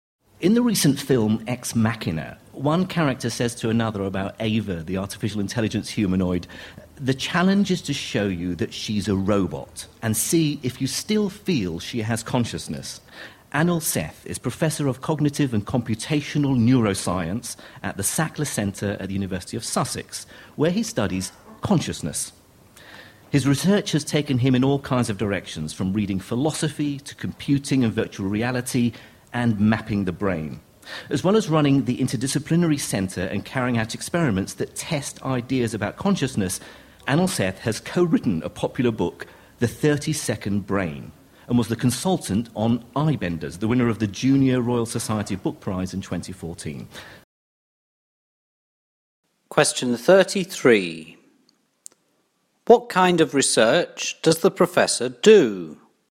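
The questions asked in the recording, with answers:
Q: What kind of research does the professor do?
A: Research on consciousness (cognitive and computational neuroscience)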